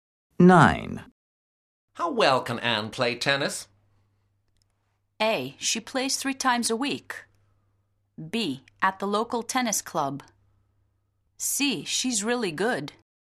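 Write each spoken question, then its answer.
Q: How well can Anne play tennis?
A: C: She's really good.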